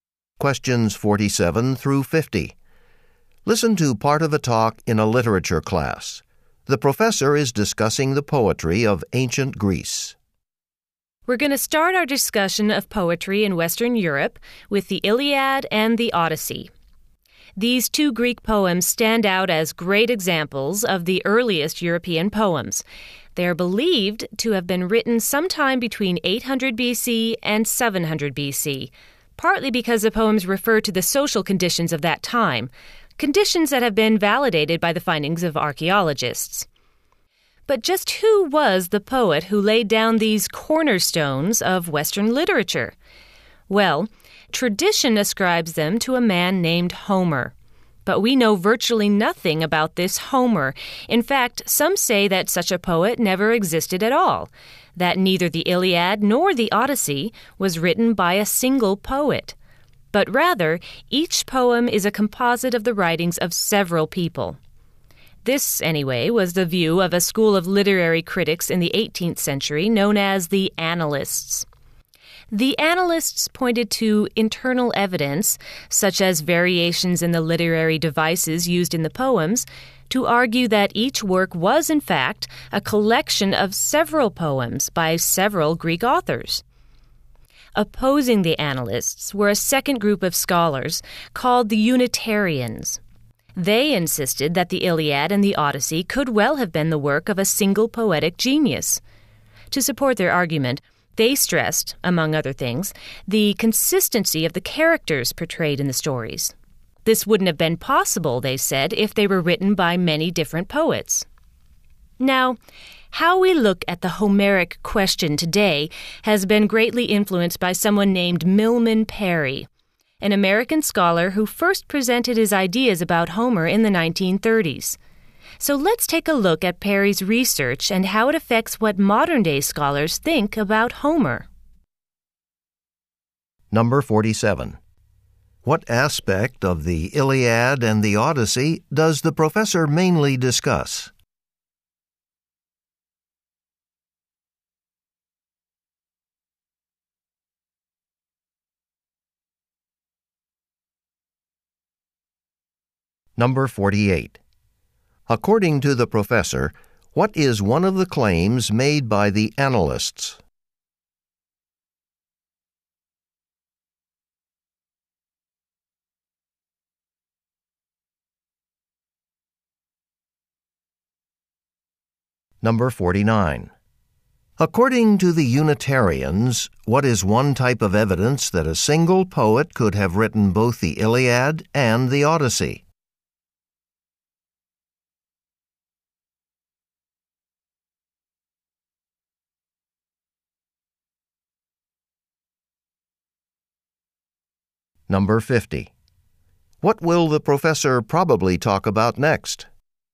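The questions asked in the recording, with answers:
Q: What aspect of the Iliad and the Odyssey does the professor mainly discuss?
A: Who wrote them.

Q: According to the professor, what is one of the claims made by the analysts?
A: Each poem is a collection of works by several authors.

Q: According to the Unitarians, what is one type of evidence that a single poet could have written both the Iliad and the Odyssey?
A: The characters are portrayed consistently.

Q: What will the professor probably talk about next?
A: Milman Parry's research on Homer.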